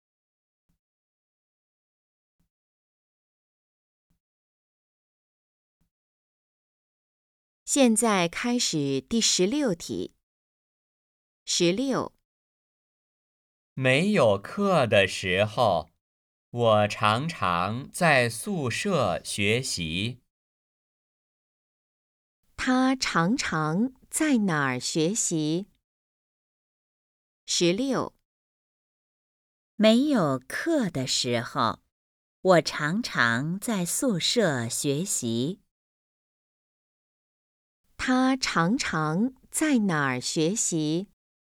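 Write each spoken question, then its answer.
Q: 他常常在哪儿学习?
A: 在宿舍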